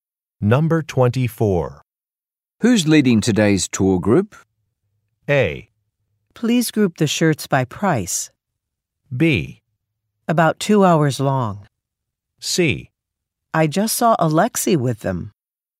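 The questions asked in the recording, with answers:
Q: Who's leading today's tour group?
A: C: I just saw Alexei with them.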